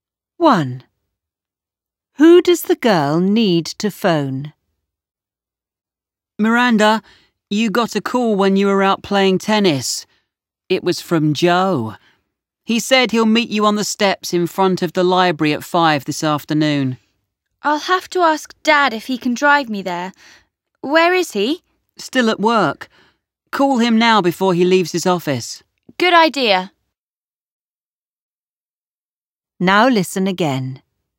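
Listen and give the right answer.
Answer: Her dad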